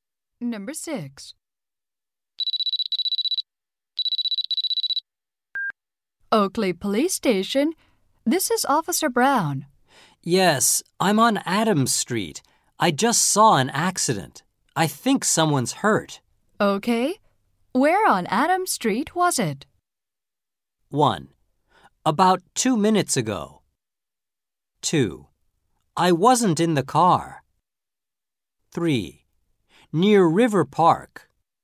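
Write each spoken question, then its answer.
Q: Okay. Where on Adams Street was it?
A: 3: Near River Park.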